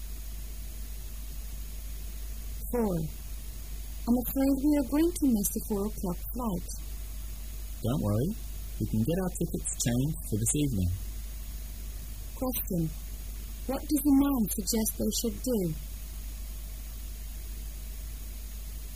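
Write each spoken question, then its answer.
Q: What does the man suggest they should do?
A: Change their tickets to a flight this evening

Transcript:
[解析] W: I'm afraid we are going to miss the 4-o'clock flight. M: Don't worry. We can get our tickets changed for this evening. Q: What does the man suggest they should do?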